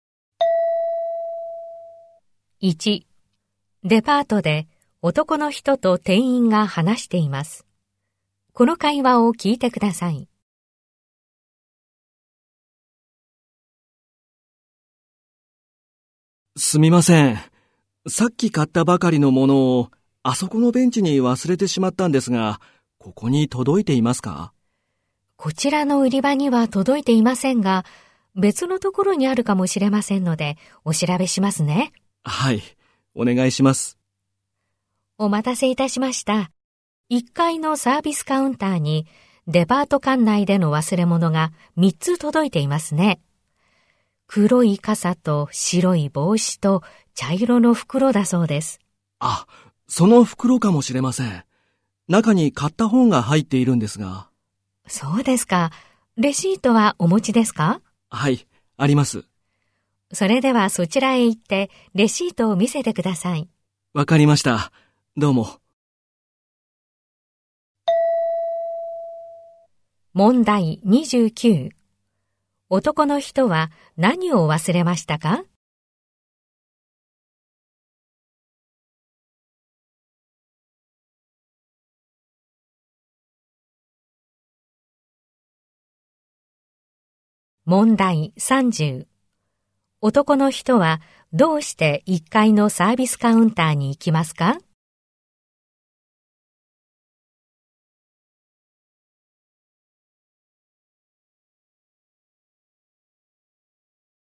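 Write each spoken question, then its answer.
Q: 男の人は何を忘れましたか?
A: 本が入った茶色の袋

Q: 男の人はどうして1階のサービスカウンターに行きますか?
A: レシートを見せて忘れ物の袋を受け取るため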